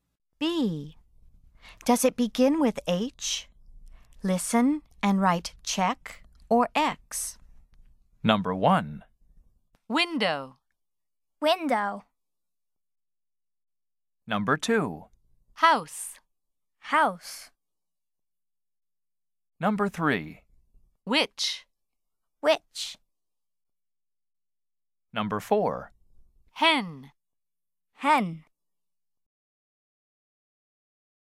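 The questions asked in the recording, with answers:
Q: Window.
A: X (does not begin with H)

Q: House.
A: check (begins with H)

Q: Which.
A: X (does not begin with H)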